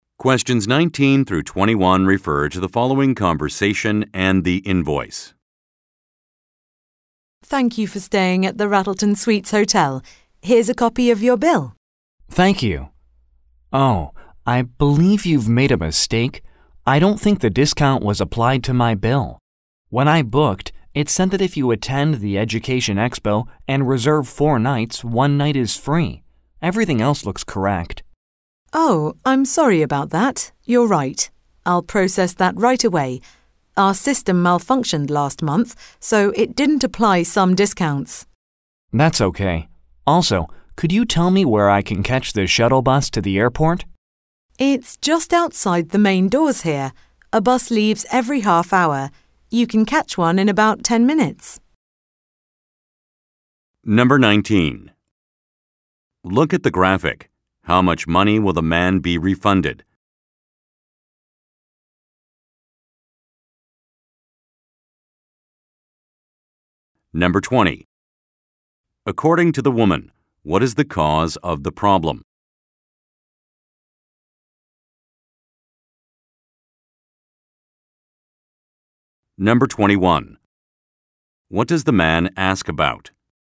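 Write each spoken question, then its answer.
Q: According to the woman, what is the cause of the problem?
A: The hotel's system malfunctioned last month

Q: What does the man ask about?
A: Where to catch the shuttle bus to the airport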